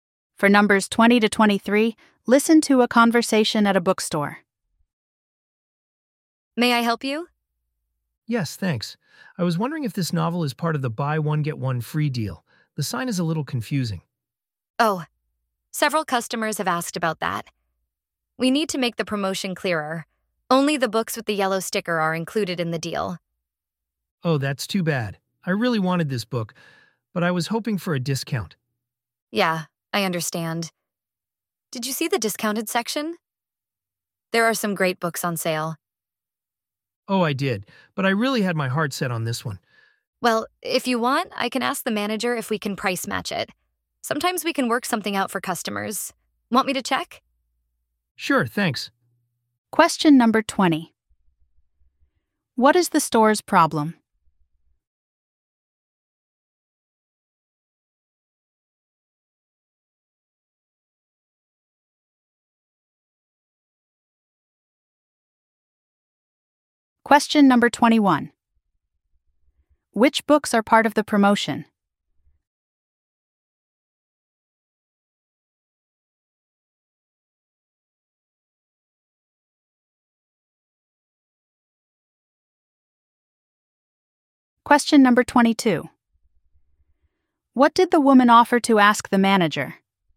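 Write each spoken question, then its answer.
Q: What is the store's problem?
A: Its promotion sign is confusing

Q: Which books are part of the promotion?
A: Books with a yellow sticker

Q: What did the woman offer to ask the manager?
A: Whether they can price match the book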